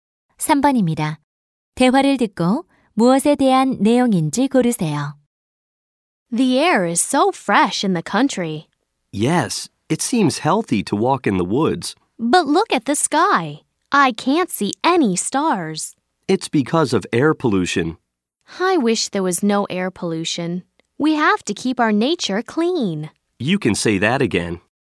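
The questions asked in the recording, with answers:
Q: 대화를 듣고 무엇에 대한 내용인지 고르세요.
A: 대기 오염 (air pollution)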